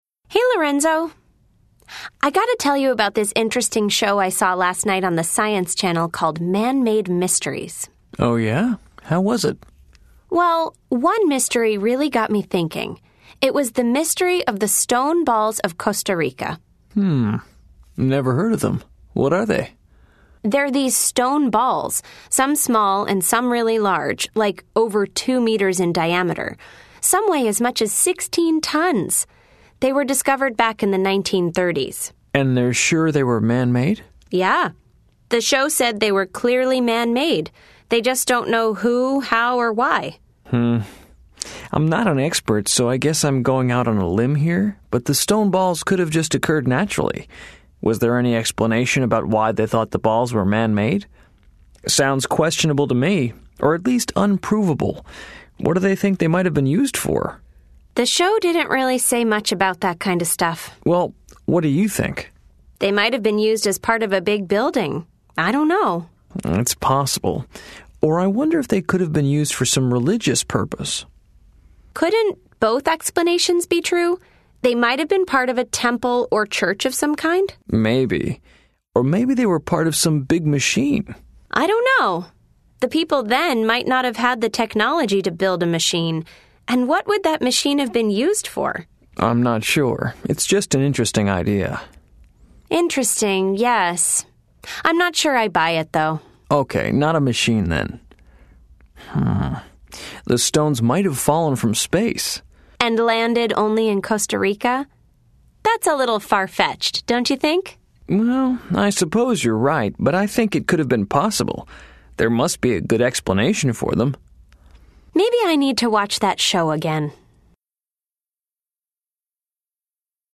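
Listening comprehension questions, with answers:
Listen to the conversation. Then choose the correct answers.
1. What did the show say about the origin of the stone balls?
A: They were clearly man-made, but no one knows who made them, how or why.

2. What does Lorenzo think about the origin of the stone balls?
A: They could have occurred naturally.

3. What do Fran and Lorenzo disagree about?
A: Whether the stone balls were part of a machine.

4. Does Fran think the stone balls could have been a part of a machine?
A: Yes, she thinks it's possible.

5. What does Lorenzo believe about the stone balls falling from space?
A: He thinks it's far-fetched.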